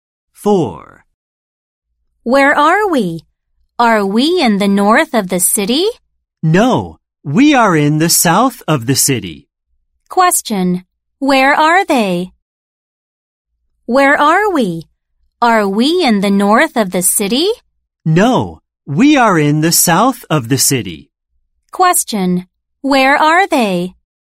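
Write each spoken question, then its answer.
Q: where are they?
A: In the south of the city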